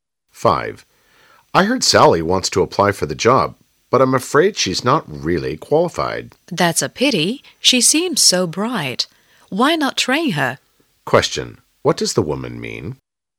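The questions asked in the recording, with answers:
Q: What does the woman mean?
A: Sally could be trained for the job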